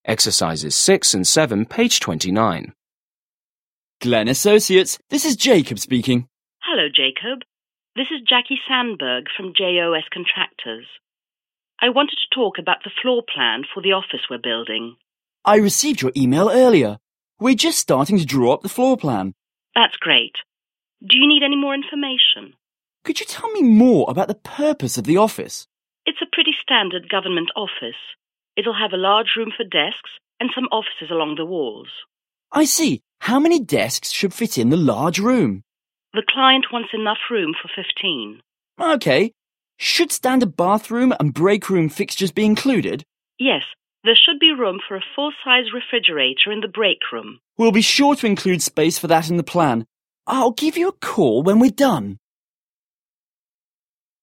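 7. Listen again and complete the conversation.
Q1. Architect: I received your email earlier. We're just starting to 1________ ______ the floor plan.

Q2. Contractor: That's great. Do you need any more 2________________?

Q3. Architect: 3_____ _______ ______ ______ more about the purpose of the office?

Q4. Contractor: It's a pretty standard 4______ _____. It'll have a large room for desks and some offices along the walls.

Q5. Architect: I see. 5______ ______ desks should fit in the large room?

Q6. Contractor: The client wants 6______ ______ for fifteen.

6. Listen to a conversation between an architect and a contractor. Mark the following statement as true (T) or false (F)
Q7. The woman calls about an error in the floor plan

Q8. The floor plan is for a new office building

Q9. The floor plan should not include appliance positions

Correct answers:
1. draw up
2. information
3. Could you tell me
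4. government office
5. How many
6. enough room
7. F
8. T
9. F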